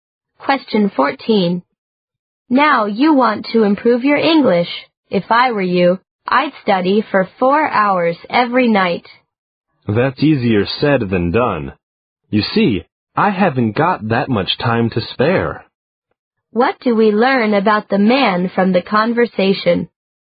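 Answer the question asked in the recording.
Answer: He doesn't have enough time to study 4 hours every night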